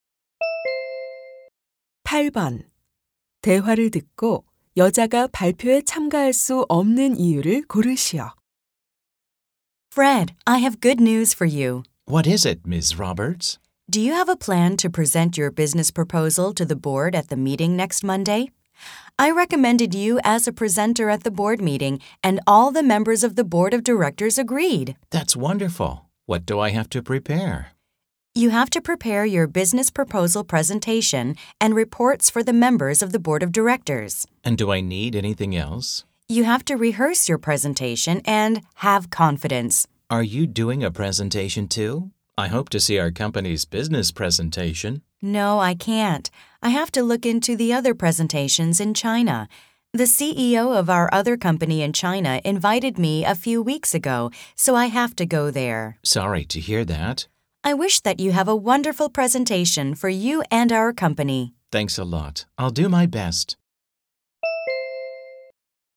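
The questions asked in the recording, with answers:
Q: 대화를 듣고 여자가 발표에 참가할 수 없는 이유를 고르시오.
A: 중국에 있는 다른 회사의 발표를 살펴보러 중국에 가야 해서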